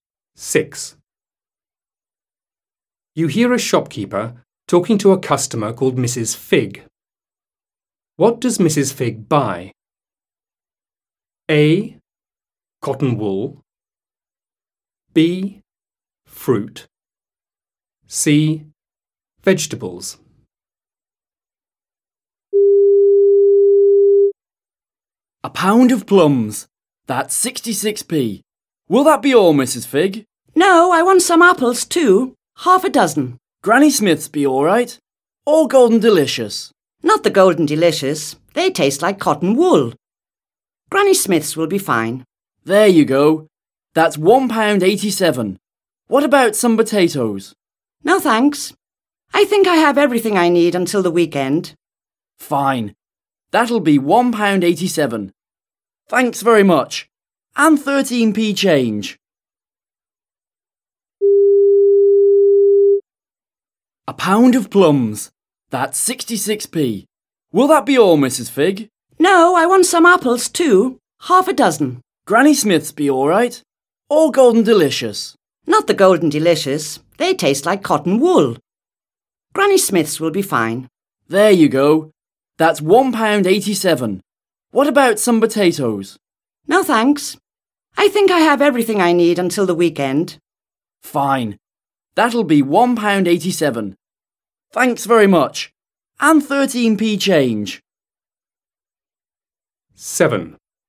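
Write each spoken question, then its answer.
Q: What does Mrs. Fig buy?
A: B: Fruit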